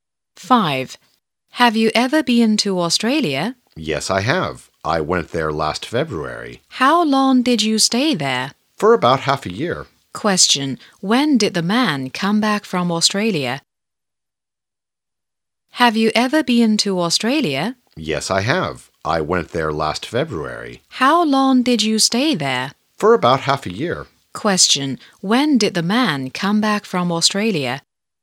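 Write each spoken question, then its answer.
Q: When did the man come back from Australia?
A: In August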